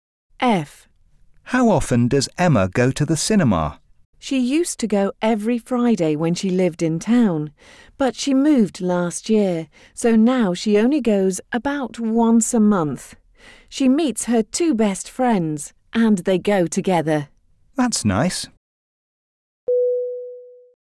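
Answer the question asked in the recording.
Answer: About once a month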